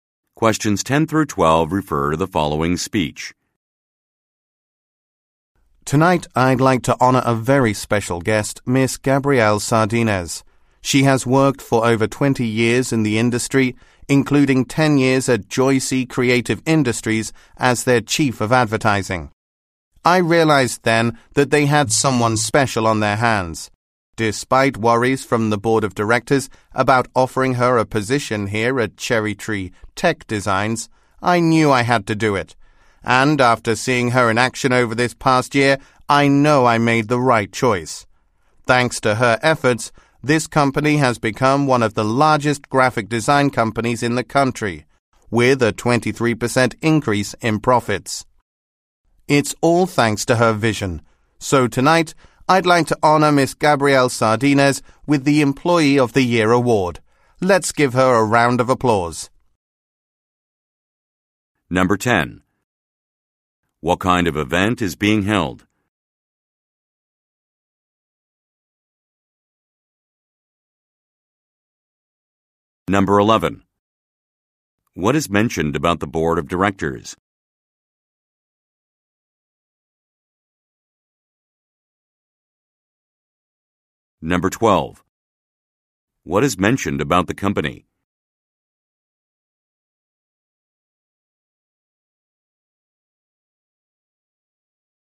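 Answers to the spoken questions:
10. An awards ceremony (Employee of the Year)
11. They had worries about offering Miss Sardinez a position
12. Its profits increased by 23%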